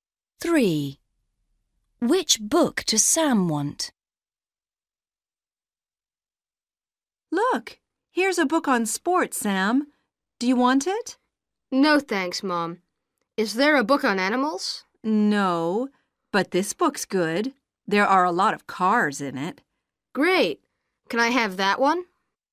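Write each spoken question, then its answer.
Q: Which book does Sam want?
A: The book with a lot of cars in it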